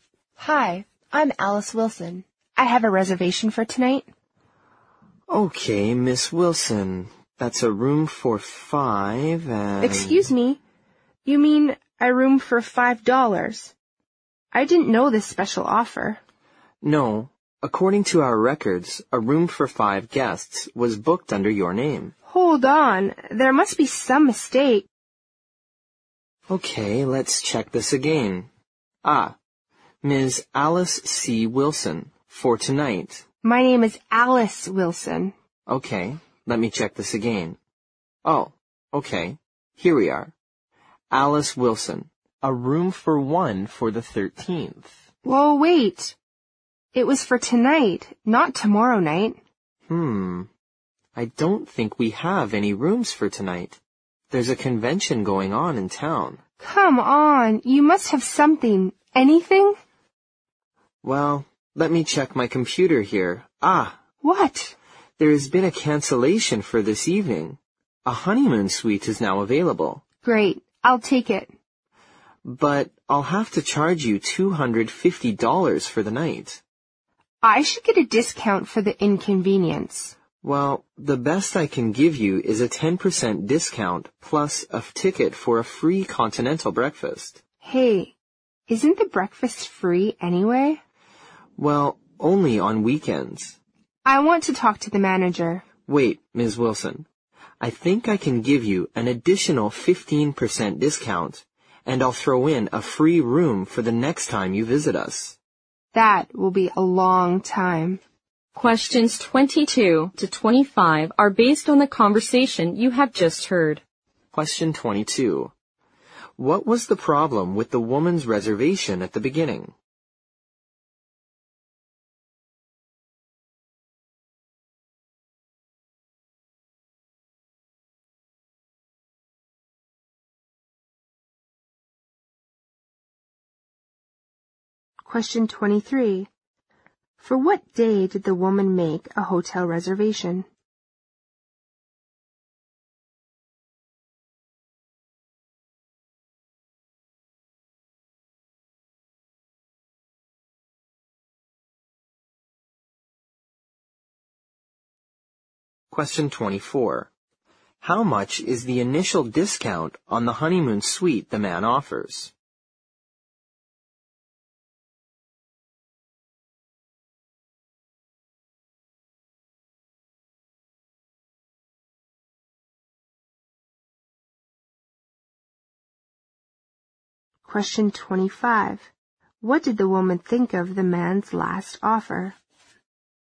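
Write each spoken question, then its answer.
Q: How much is the initial discount on the honeymoon suite the man offers?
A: 10%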